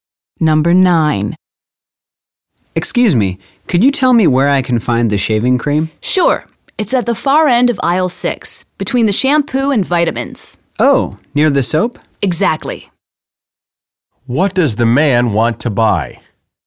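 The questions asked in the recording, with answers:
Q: What does the man want to buy?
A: Shaving cream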